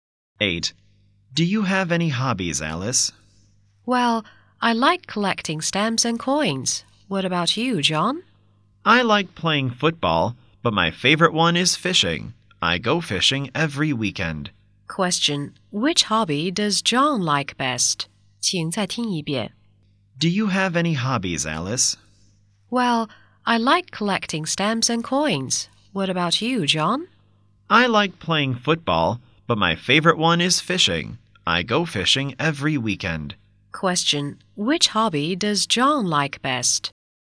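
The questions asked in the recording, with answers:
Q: Which hobby does John like best?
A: Fishing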